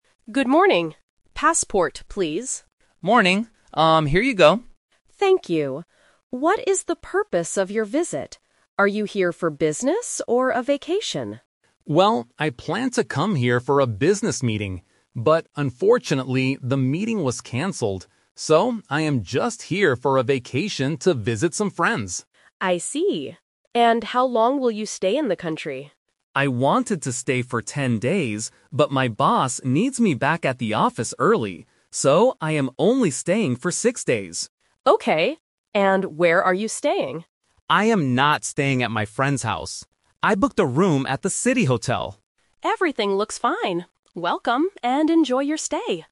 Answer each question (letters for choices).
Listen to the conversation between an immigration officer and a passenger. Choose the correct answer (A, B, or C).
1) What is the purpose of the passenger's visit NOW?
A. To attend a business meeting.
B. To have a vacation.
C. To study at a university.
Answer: B

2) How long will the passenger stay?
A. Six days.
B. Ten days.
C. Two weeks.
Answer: A

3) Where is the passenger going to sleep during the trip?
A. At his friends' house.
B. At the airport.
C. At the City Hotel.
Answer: C

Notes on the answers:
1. The passenger says he planned to come for a "business meeting" (Option A - The Trap), but it was canceled. He uses the word "So" to give his final decision: "I am just here for a vacation." Option (C) is a common reason to travel but is not mentioned in the audio.
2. This is a classic "Twist". The passenger says, "I wanted to stay for ten days" (Option B - The Trap), but he has to go back to work early. His final answer is "I am only staying for six days." Option (C) is never mentioned.
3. The passenger clearly states, "I booked a room at the City Hotel." Option (A) is The Trap because he mentioned visiting friends earlier, but he specifically says, "I am not staying at my friends' house." Option (B) is not mentioned.

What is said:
Officer: Good morning. Passport, please.
Passenger: Morning. Um... here you go.
Officer: Thank you. What is the purpose of your visit? Are you here for business or a vacation?
Passenger: Well, I planned to come here for a business meeting. But unfortunately, the meeting was canceled. So, I am just here for a vacation to visit some friends.
Officer: I see. And how long will you stay in the country?
Passenger: I wanted to stay for ten days, but my boss needs me back at the office early. So, I am only staying for six days.
Officer: Okay. And where are you staying?
Passenger: I am not staying at my friends' house. I booked a room at the City Hotel.